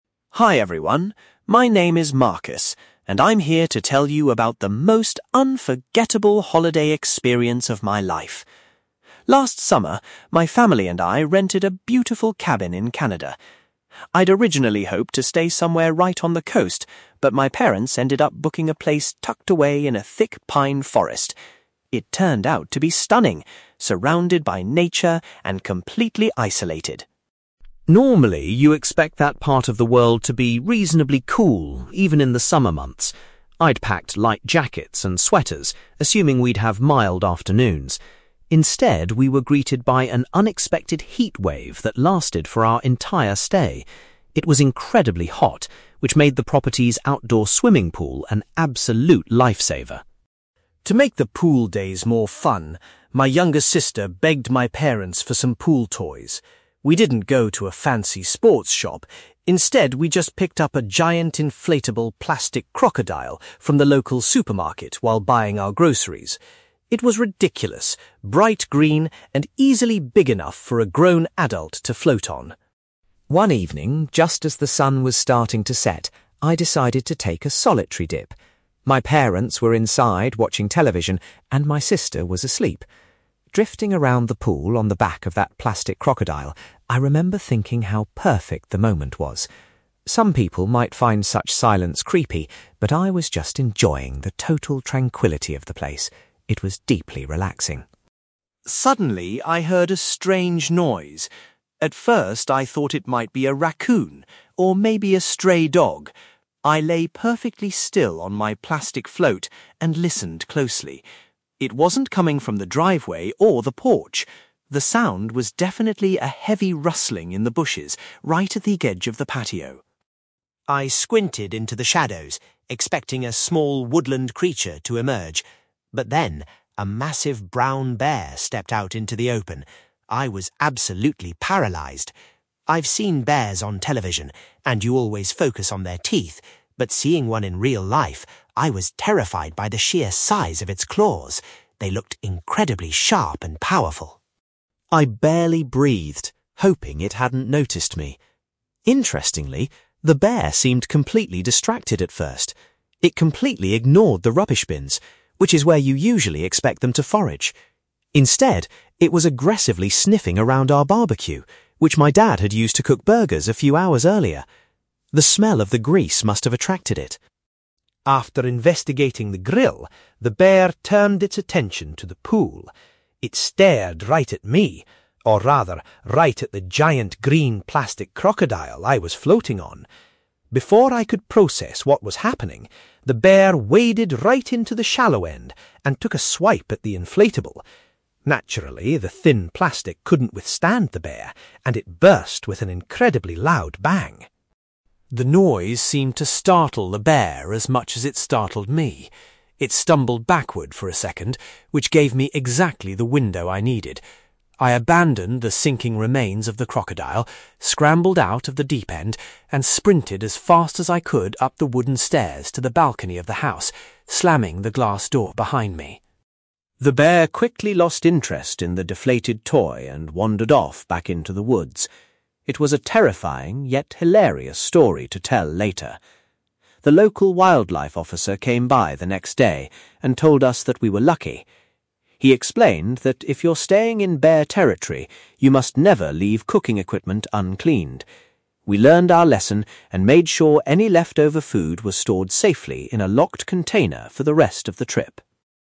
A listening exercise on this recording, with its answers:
You will hear a young man called Marcus talking about an unexpected encounter with a wild animal during a family holiday. For questions 9-18, complete the sentences with a word or short phrase.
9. Marcus was initially surprised that his family's holiday accommodation was situated in a (9)........................... .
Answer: pine forest

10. Marcus says that an unpredicted (10)........................... made having a swimming pool very useful.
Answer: heatwave

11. The family bought the inflatable crocodile from a (11)........................... in the nearest town.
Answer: supermarket

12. While floating in the pool alone, Marcus appreciated the (12)........................... of his surroundings.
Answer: tranquillity

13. Marcus first realised he was not alone when he heard movements in the (13)........................... nearby.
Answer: bushes

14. When the wild animal appeared, Marcus was particularly struck by the size of its (14)........................... .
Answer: claws

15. The bear initially focused its attention on the family's (15)........................... rather than the bins.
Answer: barbecue

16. The inflatable toy popped with a (16)........................... when the bear struck it.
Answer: loud bang

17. Marcus managed to escape from the pool and run up to the (17)........................... of the property.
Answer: balcony

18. An expert advised Marcus and his family to use a (18)........................... for keeping their food safe.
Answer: locked container

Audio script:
Marcus: Hi everyone, my name is Marcus, and I'm here to tell you about the most unforgettable holiday experience of my life. Last summer, my family and I rented a beautiful cabin in Canada. I'd originally hoped to stay somewhere right on the coast, but my parents ended up booking a place tucked away in a thick pine forest. It turned out to be stunning, surrounded by nature and completely isolated.
Normally, you expect that part of the world to be reasonably cool, even in the summer months. I'd packed light jackets and sweaters, assuming we'd have mild afternoons. Instead, we were greeted by an unexpected heatwave that lasted for our entire stay. It was incredibly hot, which made the property's outdoor swimming pool an absolute lifesaver.
To make the pool days more fun, my younger sister begged my parents for some pool toys. We didn't go to a fancy sports shop; instead, we just picked up a giant inflatable plastic crocodile from the local supermarket while buying our groceries. It was ridiculous, bright green, and easily big enough for a grown adult to float on.
One evening, just as the sun was starting to set, I decided to take a solitary dip. My parents were inside watching television, and my sister was asleep. Drifting around the pool on the back of that plastic crocodile, I remember thinking how perfect the moment was. Some people might find such silence creepy, but I was just enjoying the total tranquillity of the place. It was deeply relaxing.
Suddenly, I heard a strange noise. At first, I thought it might be a raccoon or maybe a stray dog. I lay perfectly still on my plastic float and listened closely. It wasn't coming from the driveway or the porch. The sound was definitely a heavy rustling in the bushes right at the edge of the patio.
I squinted into the shadows, expecting a small woodland creature to emerge. But then, a massive brown bear stepped out into the open. I was absolutely paralysed. I've seen bears on television, and you always focus on their teeth, but seeing one in real life, I was terrified by the sheer size of its claws. They looked incredibly sharp and powerful.
I barely breathed, hoping it hadn't noticed me. Interestingly, the bear seemed completely distracted at first. It completely ignored the rubbish bins, which is where you usually expect them to forage. Instead, it was aggressively sniffing around our barbecue which my dad had used to cook burgers a few hours earlier. The smell of the grease must have attracted it.
After investigating the grill, the bear turned its attention to the pool. It stared right at me—or rather, right at the giant green plastic crocodile I was floating on. Before I could process what was happening, the bear waded right into the shallow end and took a swipe at the inflatable. Naturally, the thin plastic couldn't withstand the bear, and it burst with an incredibly loud bang.
The noise seemed to startle the bear as much as it startled me. It stumbled backward for a second, which gave me exactly the window I needed. I abandoned the sinking remains of the crocodile, scrambled out of the deep end, and sprinted as fast as I could up the wooden stairs to the balcony of the house, slamming the glass door behind me.
The bear quickly lost interest in the deflated toy and wandered off back into the woods. It was a terrifying, yet hilarious story to tell later. The local wildlife officer came by the next day and told us that we were lucky. He explained that if you're staying in bear territory, you must never leave cooking equipment uncleaned. We learned our lesson and made sure any leftover food was stored safely in a locked container for the rest of the trip!

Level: B2